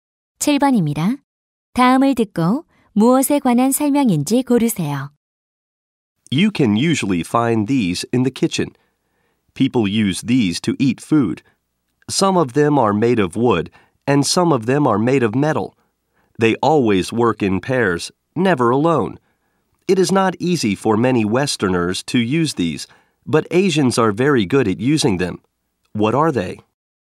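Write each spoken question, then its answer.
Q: 다음을 듣고 무엇에 관한 설명인지 고르세요.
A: 젓가락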